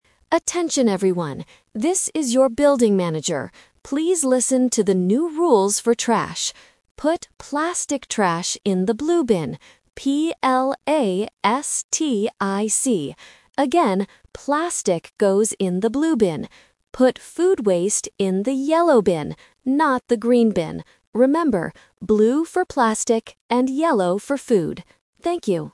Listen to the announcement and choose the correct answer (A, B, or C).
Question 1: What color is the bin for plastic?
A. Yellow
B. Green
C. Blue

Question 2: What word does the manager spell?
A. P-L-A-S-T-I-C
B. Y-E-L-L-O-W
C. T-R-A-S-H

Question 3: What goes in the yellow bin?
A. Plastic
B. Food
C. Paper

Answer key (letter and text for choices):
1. C. Blue
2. A. P-L-A-S-T-I-C
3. B. Food

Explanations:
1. The manager says, "Put plastic trash in the blue bin" and repeats it later: "blue for plastic." Why the trap is wrong: Yellow (A) is for food. Green (B) is mentioned ("Not the green bin") as a distractor to test if the student is listening to the negation.
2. The manager spells out the word for the material: "P-L-A-S-T-I-C." Why the trap is wrong: Yellow (B) and Trash (C) are important words in the script, but they are not spelled out.
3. The manager says, "Put food waste in the yellow bin" and confirms "yellow for food." Why the trap is wrong: Plastic (A) belongs in the blue bin. Paper (C) is a common type of trash but is not mentioned in this audio.

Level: A1